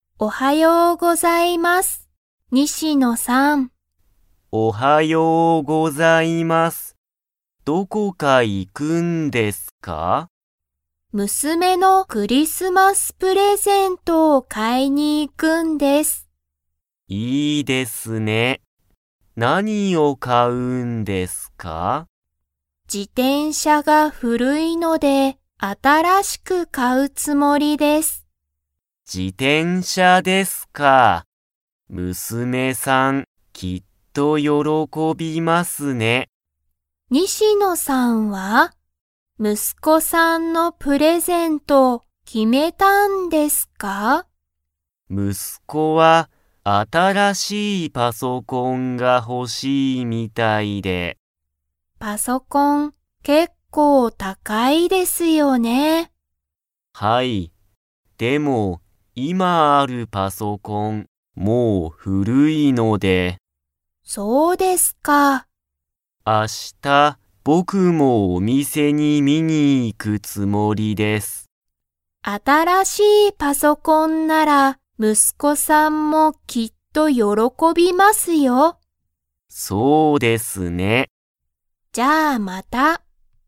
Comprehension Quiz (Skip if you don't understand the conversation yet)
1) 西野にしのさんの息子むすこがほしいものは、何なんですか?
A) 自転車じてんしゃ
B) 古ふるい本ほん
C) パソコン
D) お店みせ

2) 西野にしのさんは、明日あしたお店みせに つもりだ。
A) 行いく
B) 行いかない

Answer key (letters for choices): 1C, 2A

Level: Level 3